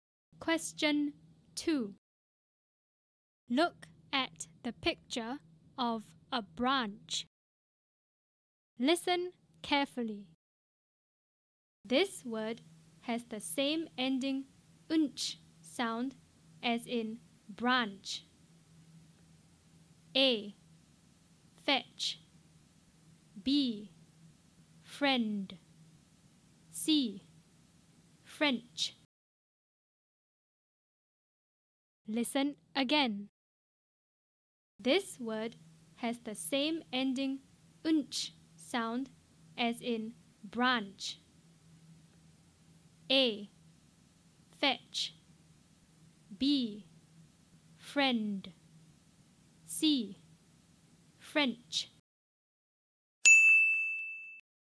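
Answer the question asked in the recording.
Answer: C: French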